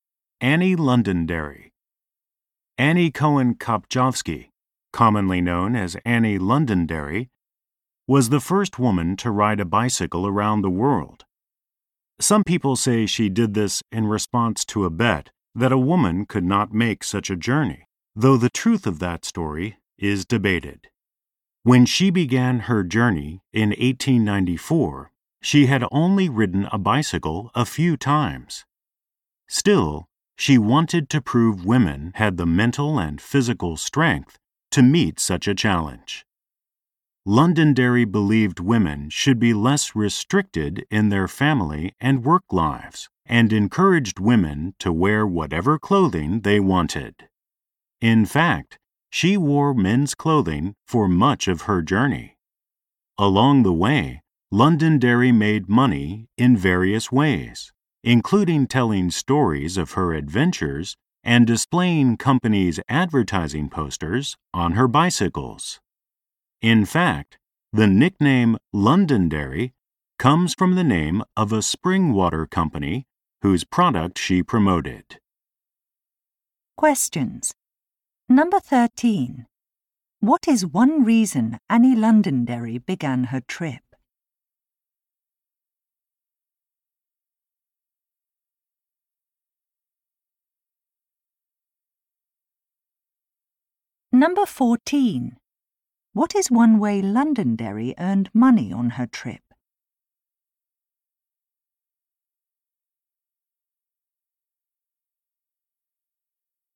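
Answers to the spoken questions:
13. To prove women had the mental and physical strength to meet such a challenge
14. By displaying companies' advertising posters on her bicycle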